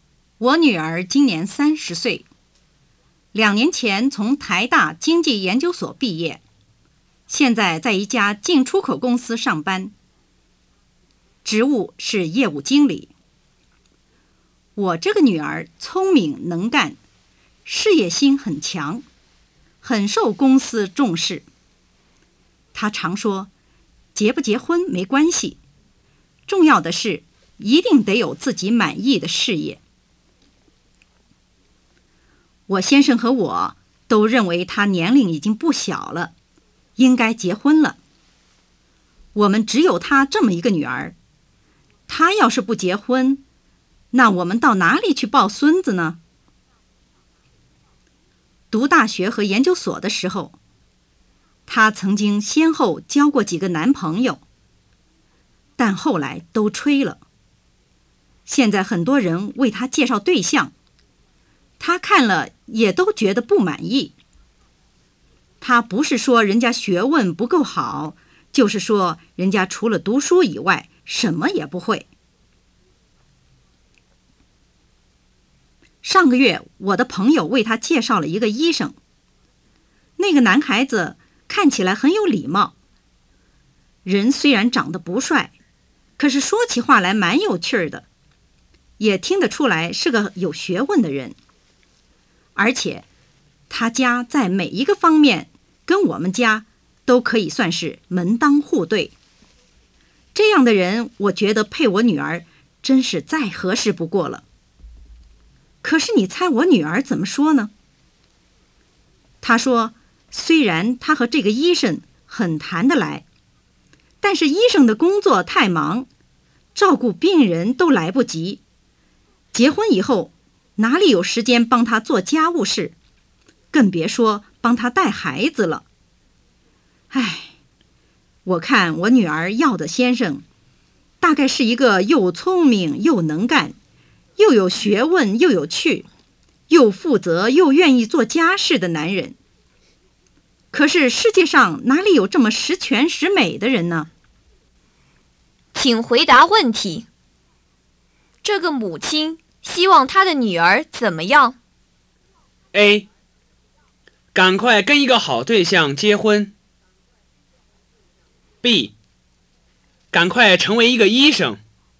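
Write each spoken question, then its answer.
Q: 这个母亲希望她的女儿怎么样?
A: A: 赶快跟一个好对象结婚。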